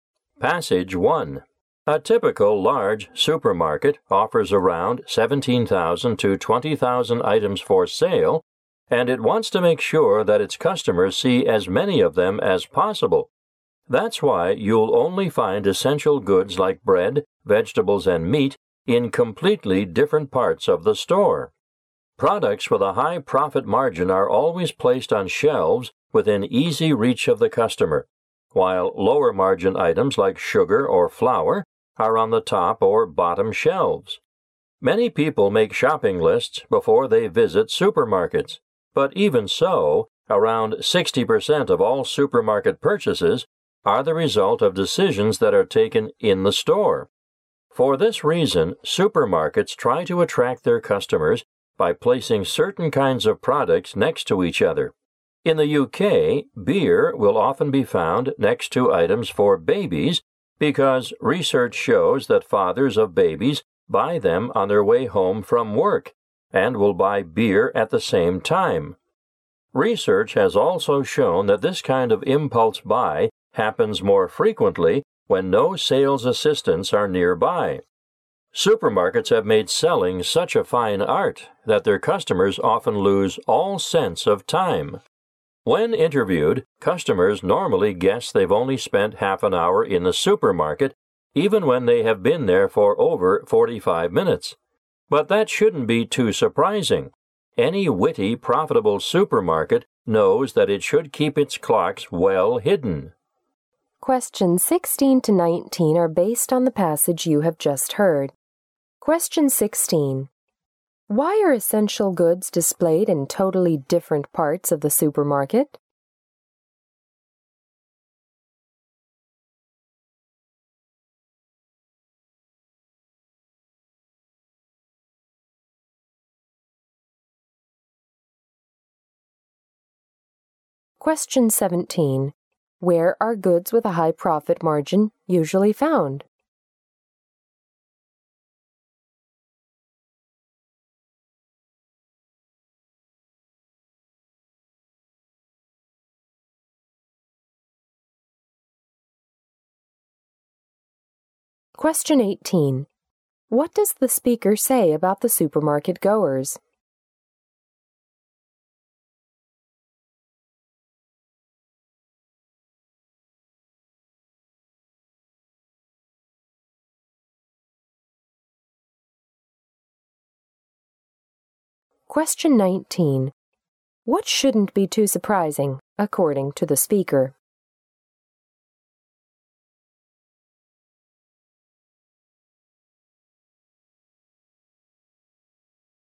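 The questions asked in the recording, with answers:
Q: Why are essential goods displayed in totally different parts of the supermarket?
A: So customers see as many items as possible

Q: Where are goods with a high profit margin usually found?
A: On shelves within easy reach of customers

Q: What shouldn't be too surprising, according to the speaker?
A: That supermarkets keep their clocks hidden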